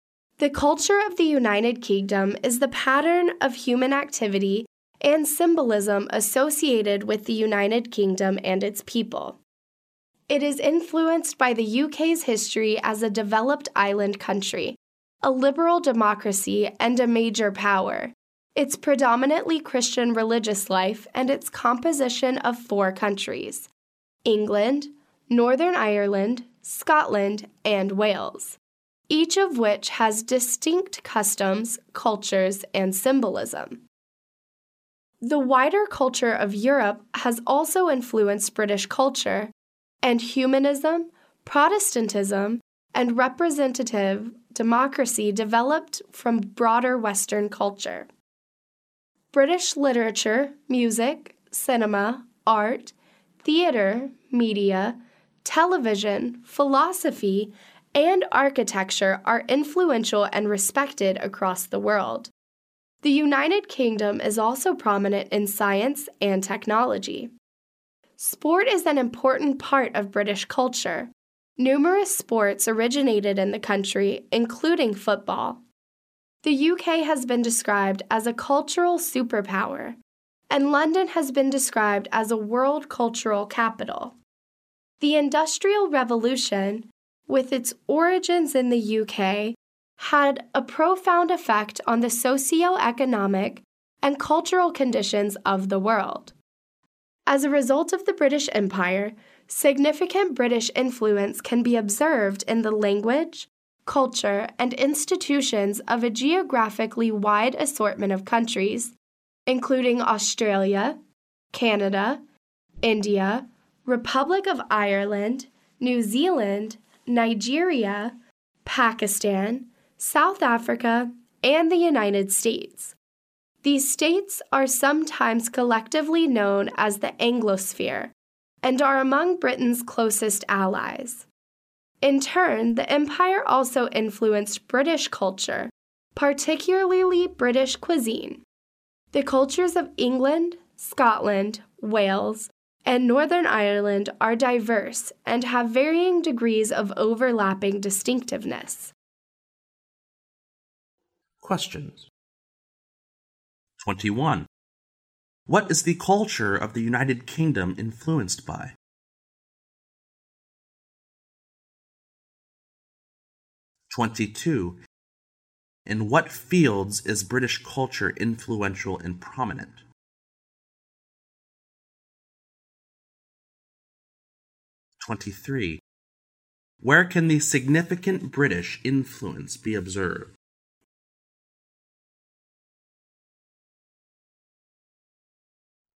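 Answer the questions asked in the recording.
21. Its history as a developed island country, liberal democracy and major power, its mainly Christian religious life, and its four countries
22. Literature, music, cinema, art, theater, media, television, philosophy, architecture, science and technology
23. In the language, culture and institutions of many countries, such as Australia, Canada, India, Ireland, New Zealand, Nigeria, Pakistan, South Africa and the United States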